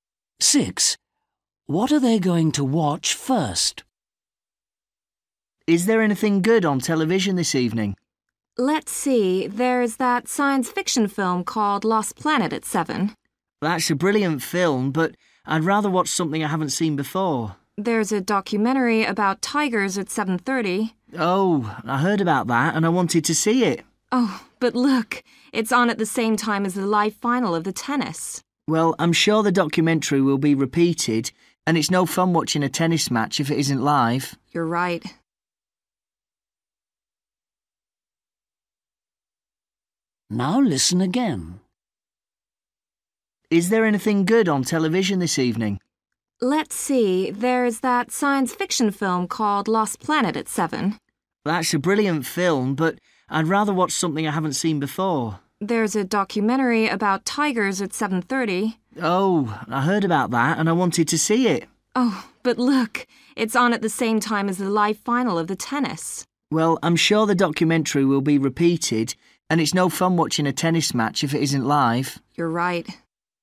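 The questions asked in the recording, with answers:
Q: What are they going to watch first?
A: the live tennis final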